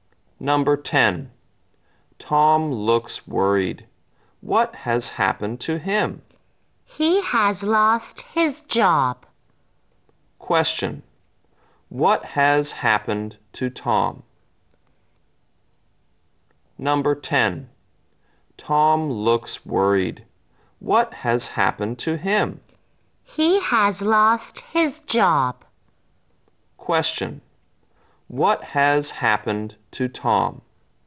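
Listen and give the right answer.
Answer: He has lost his job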